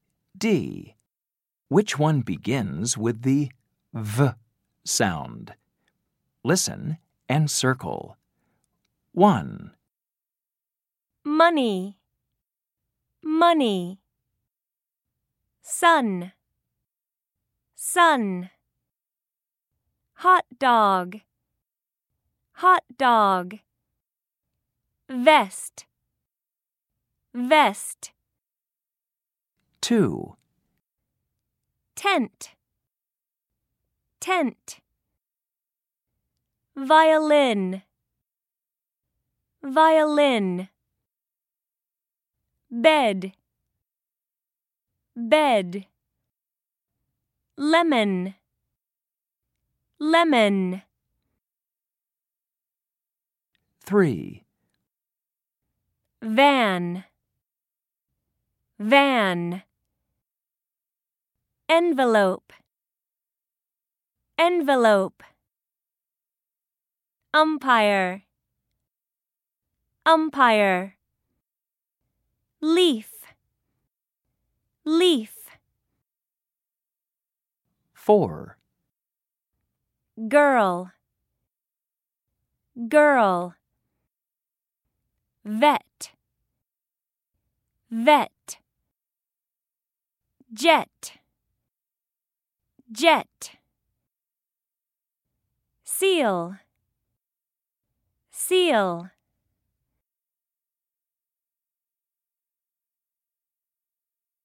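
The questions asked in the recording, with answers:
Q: Which one begins with the V sound?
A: Vest

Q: Which one begins with the V sound?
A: Violin

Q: Which one begins with the V sound?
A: Van

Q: Which one begins with the V sound?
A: Vet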